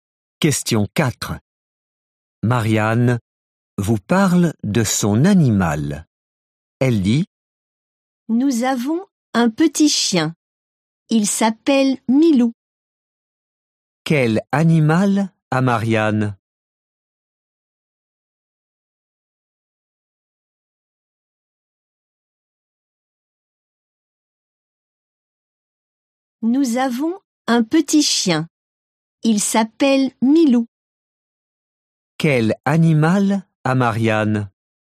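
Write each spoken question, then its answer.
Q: Quel animal a Marianne ?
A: Un petit chien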